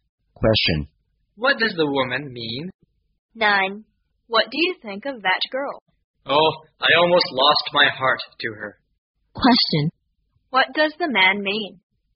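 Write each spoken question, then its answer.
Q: What does the man mean?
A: He has almost fallen in love with her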